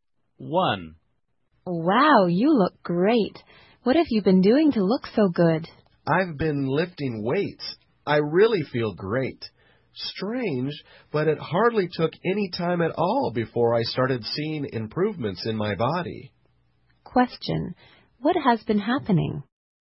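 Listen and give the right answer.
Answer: The man has been lifting weights and quickly saw his body improve.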